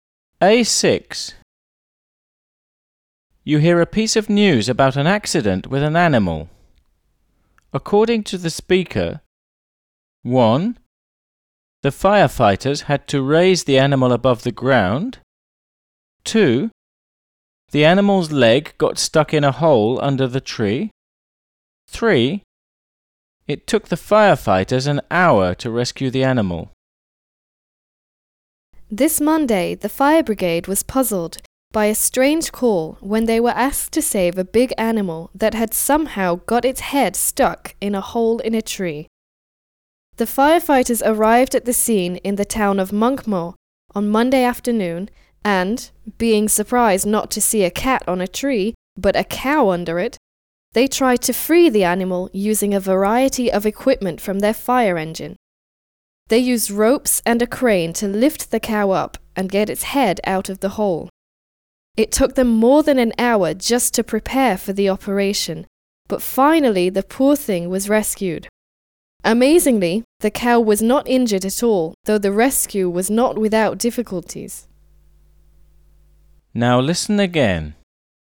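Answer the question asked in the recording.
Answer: 1: The firefighters had to raise the animal above the ground.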